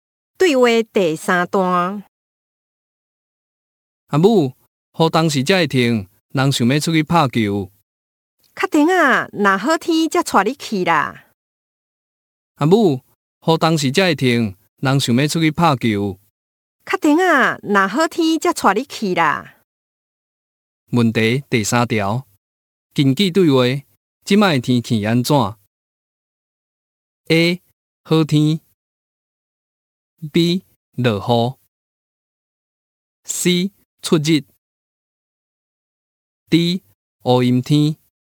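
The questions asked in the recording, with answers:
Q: 根据对话,即卖天气安怎 ?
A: B: 落雨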